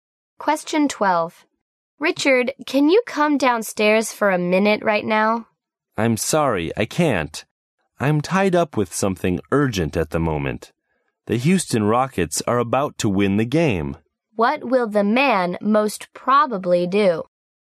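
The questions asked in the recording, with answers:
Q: What will the man most probably do?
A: Keep watching the basketball game instead of coming downstairs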